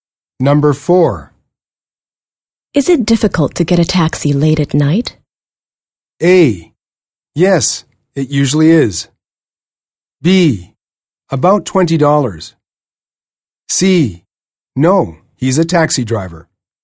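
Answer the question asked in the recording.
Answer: A: Yes, it usually is.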